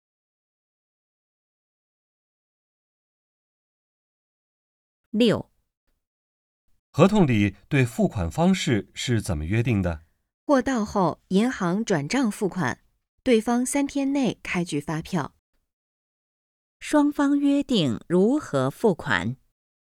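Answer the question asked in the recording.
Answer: 货到后银行转账付款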